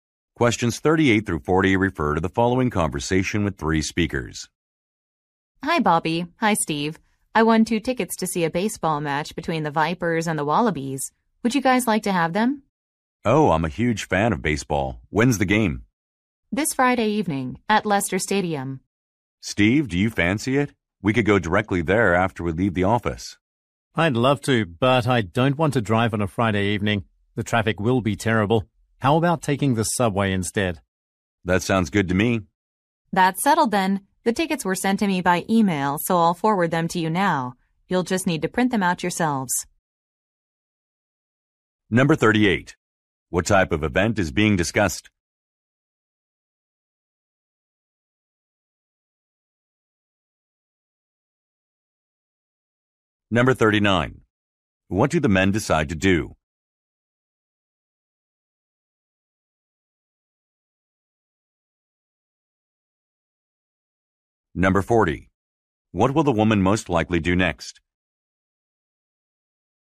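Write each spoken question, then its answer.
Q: What type of event is being discussed?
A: A baseball game

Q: What do the men decide to do?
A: Take the subway

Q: What will the woman most likely do next?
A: Forward the tickets by email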